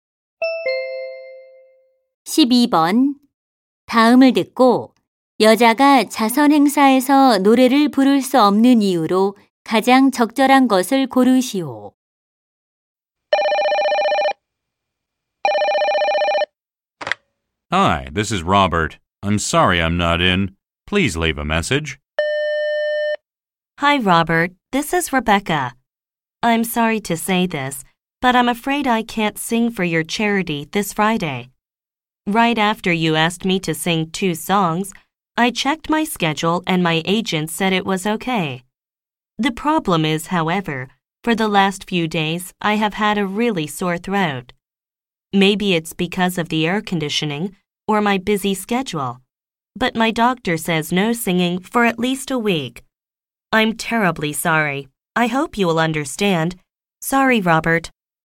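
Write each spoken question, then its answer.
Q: 다음을 듣고 여자가 자선 행사에서 노래를 부를 수 없는 이유로 가장 적절한 것을 고르시오.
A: 목이 아파서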